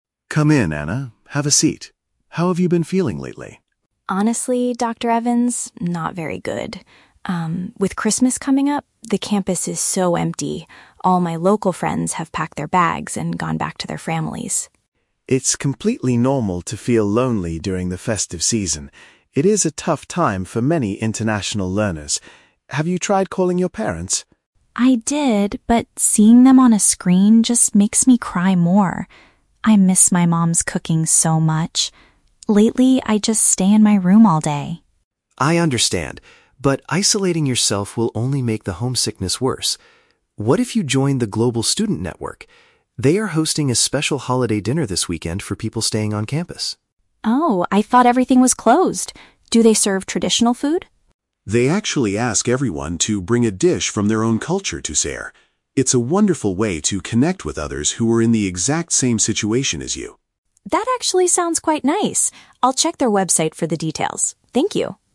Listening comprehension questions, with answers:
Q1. Why is the student feeling particularly sad right now?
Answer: Her native classmates have left the university for the festive season.

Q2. What happens when the student talks to her parents on video calls?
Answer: She becomes even more upset and isolates herself in her room.

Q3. What does the counselor suggest the student do for the upcoming weekend?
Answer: Attend a shared cultural meal organized by an international group.

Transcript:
Counselor: Come in, Anna. Have a seat. How have you been feeling lately?
Student: Honestly, Dr. Evans, not very good. with Christmas coming up, the campus is so empty. All my local friends have packed their bags and gone back to their families.
Counselor: It's completely normal to feel lonely during the festive season. It is a tough time for many international learners. Have you tried calling your parents?
Student: I did, but seeing them on a screen just makes me cry more. I miss my mom's cooking so much. Lately, I just stay in my room all day.
Counselor: I understand. But isolating yourself will only make the homesickness worse. What if you joined the Global Student Network? They are hosting a special holiday dinner this weekend for people staying on campus.
Student: Oh, I thought everything was closed. Do they serve traditional food?
Counselor: They actually ask everyone to bring a dish from their own culture to share. It's a wonderful way to connect with others who are in the exact same situation as you.